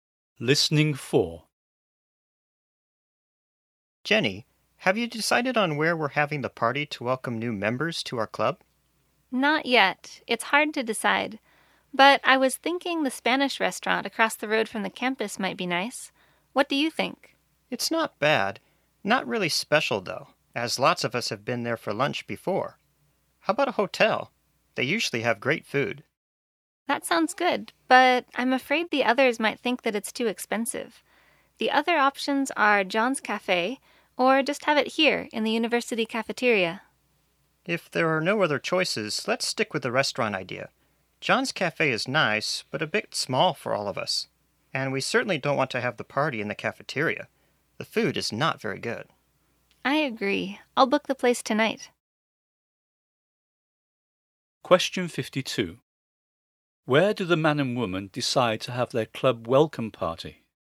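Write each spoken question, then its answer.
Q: Where do the man and woman decide to have their club welcome party?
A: At the Spanish restaurant across the road from the campus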